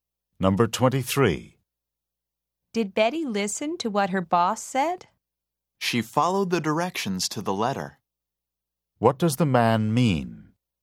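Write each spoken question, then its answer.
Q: What does the man mean?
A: Betty followed the directions exactly.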